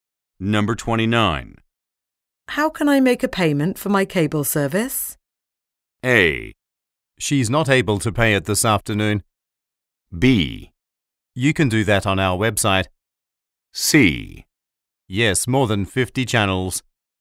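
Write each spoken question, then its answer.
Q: How can I make a payment for my cable service?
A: B: You can do that on our website.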